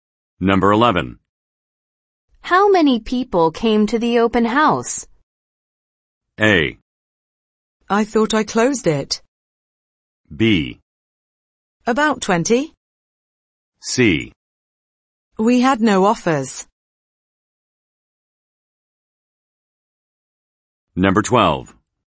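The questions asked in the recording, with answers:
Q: How many people came to the open house?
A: B: About 20.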